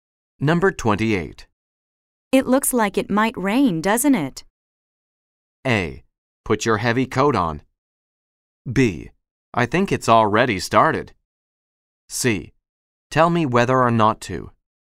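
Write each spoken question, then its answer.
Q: It looks like it might rain, doesn't it?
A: B: I think it's already started.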